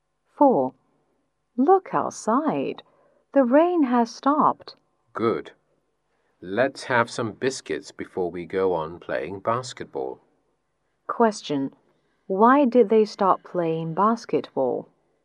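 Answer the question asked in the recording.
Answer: Because it was raining.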